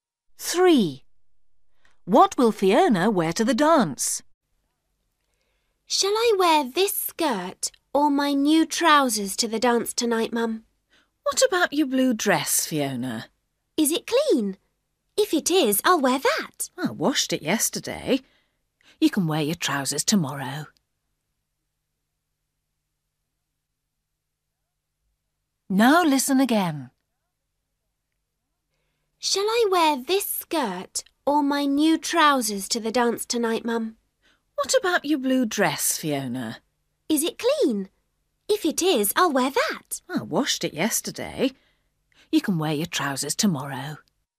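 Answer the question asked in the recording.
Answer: Her blue dress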